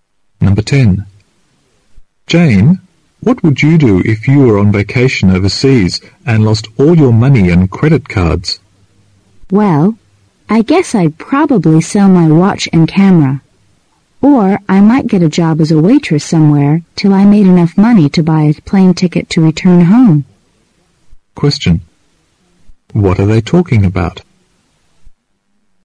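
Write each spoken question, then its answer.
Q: What are they talking about?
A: What Jane would do if she lost all her money and credit cards on vacation overseas.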